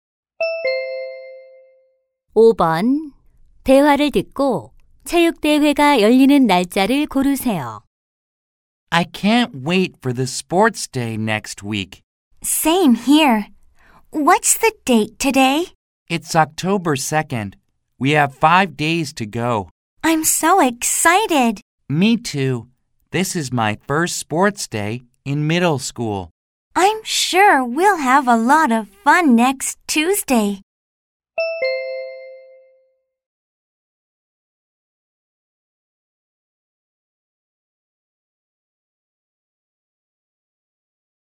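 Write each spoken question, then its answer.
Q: 대화를 듣고 체육대회가 열리는 날짜를 고르세요.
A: 10월 7일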